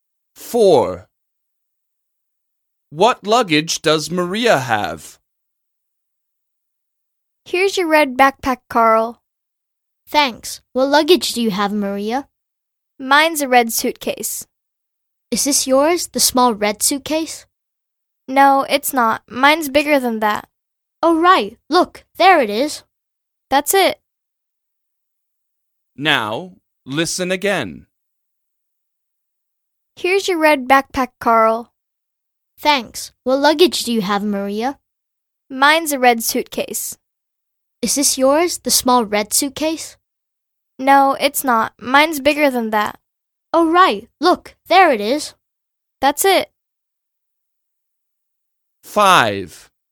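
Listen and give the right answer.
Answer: a big red suitcase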